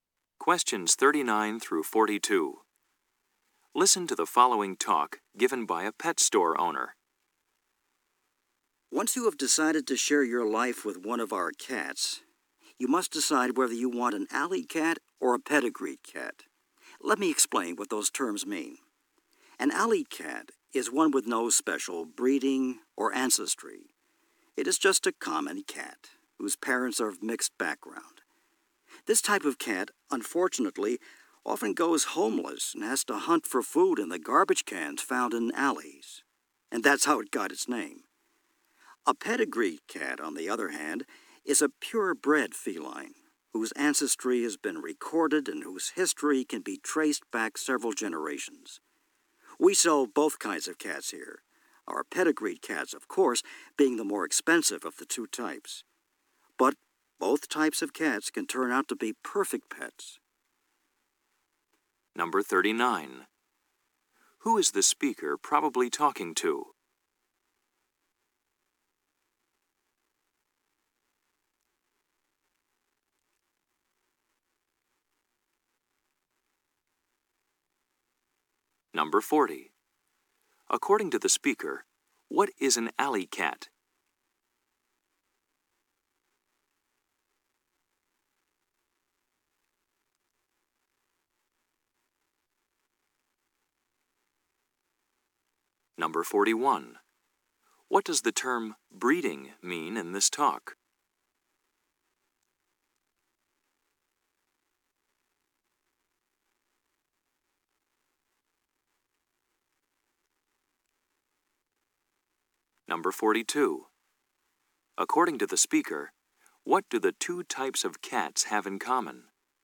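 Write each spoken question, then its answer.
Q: According to the speaker, what is an alley cat?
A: A common cat with no special breeding or ancestry

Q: According to the speaker, what do the two types of cats have in common?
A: Both can be perfect pets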